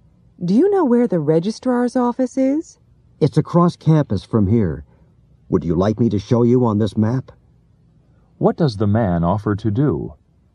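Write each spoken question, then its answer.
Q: What does the man offer to do?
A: Show her the registrar's office on a map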